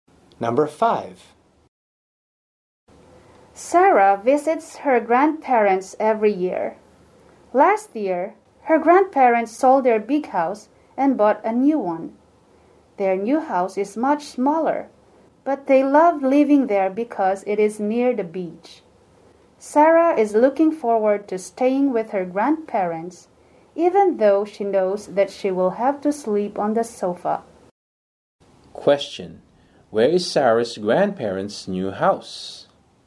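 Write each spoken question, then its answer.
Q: Where is Sarah's grandparents' new house?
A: Near the beach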